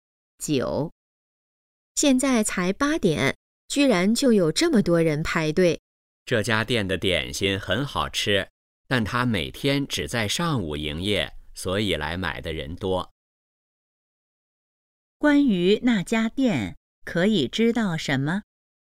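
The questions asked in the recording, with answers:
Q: 关于那家店,可以知道什么?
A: 只在上午营业,点心很好吃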